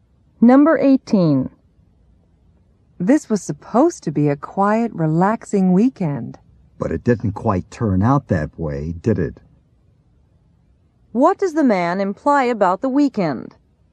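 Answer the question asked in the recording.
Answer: It was not quiet or relaxing.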